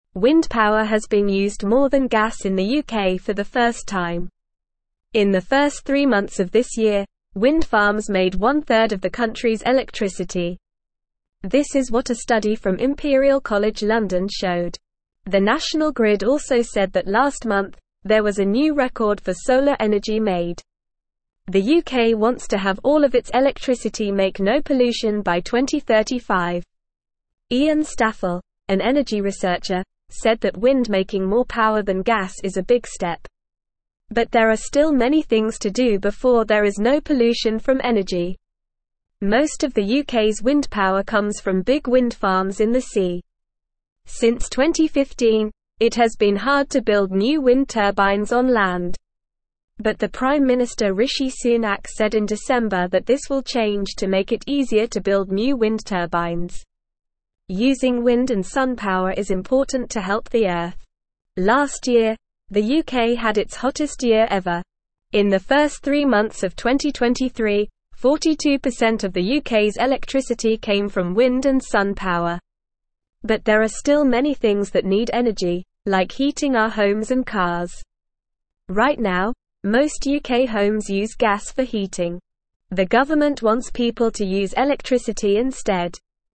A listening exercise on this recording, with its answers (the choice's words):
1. This is what a study from (1)______ College London showed.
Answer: Imperial

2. The National Grid also said that last month, there was a new record for (2)______ energy made.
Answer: solar

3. Most of the UK's wind power comes from big wind farms in the (3)______.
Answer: sea

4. In the first three months of (4)______, 42% of the UK's electricity came from wind and sun power.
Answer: 2023

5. The government wants people to use (5)______ instead.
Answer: electricity

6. What kind of power was used more than gas in the UK for the first time?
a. solar power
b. wind power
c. water power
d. coal power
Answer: wind power

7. In the first three months of this year, what percentage of the UK's electricity was made by wind farms?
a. 25%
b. 50%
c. 10%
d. 33%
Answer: 33%

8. What did the National Grid say about solar energy last month?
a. It made a new record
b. It was not used at all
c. It caused pollution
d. It was too expensive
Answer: It made a new record

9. When does the UK want to have all of its electricity make no pollution?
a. 2035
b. 2045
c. 2055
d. 2065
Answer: 2035

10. What did Prime Minister Rishi Sunak say in December?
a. It will be harder to build wind turbines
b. Wind power is not important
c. It will be easier to build wind turbines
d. Gas power is better than wind power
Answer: It will be easier to build wind turbines

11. In the first three months of 2023, what percentage of the UK's electricity came from wind and sun power?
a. 30%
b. 42%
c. 55%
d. 60%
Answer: 42%

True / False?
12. Wind power is used more than gas in the UK.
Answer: True

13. Wind farms made half of the country's electricity in the first three months of this year.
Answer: False

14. The UK wants to have all of its electricity make no pollution by 2035.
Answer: True

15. Most of the UK's wind power comes from big wind farms in the sea.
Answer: True

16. It is very easy to build new wind turbines on land in the UK.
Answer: False

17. Last year, the UK had its coldest year ever.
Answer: False

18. Most UK homes use gas for heating.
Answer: True

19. What made one third of the UK's electricity in the first three months of this year?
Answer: Wind farms made one third of the UK's electricity.

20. What is the UK's goal for electricity and pollution by 2035?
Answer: The UK wants all of its electricity to make no pollution by 2035.

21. Which power was used more than gas in the UK for the first time?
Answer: Wind power was used more than gas for the first time.

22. What did the Prime Minister Rishi Sunak say about building new wind turbines?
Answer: He said that it will become easier to build new wind turbines.

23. Why is using wind and sun power important?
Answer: Using wind and sun power is important to help the Earth.

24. In the first three months of 2023, what percent of the UK's electricity came from wind and sun power?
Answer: 42% of the UK's electricity came from wind and sun power.

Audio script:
Wind power has been used more than gas in the UK for the first time. In the first three months of this year, wind farms made one third of the country's electricity. This is what a study from Imperial College London showed. The National Grid also said that last month, there was a new record for solar energy made.
Iain Staffell, an energy researcher, said that wind making more power than gas is a big step. But there are still many things to do before there is no pollution from energy.
Since 2015, it has been hard to build new wind turbines on land. But the Prime Minister Rishi Sunak said in December that this will change to make it easier to build new wind turbines.
Using wind and sun power is important to help the Earth. Last year, the UK had its hottest year ever. In the first three months of 2023, 42% of the UK's electricity came from wind and sun power. But there are still many things that need energy, like heating our homes and cars. Right now, most UK homes use gas for heating. The government wants people to use electricity instead.

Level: Level 1